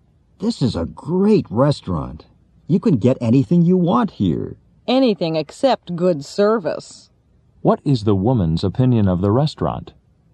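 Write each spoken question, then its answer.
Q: What is the woman's opinion of the restaurant?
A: The service is bad.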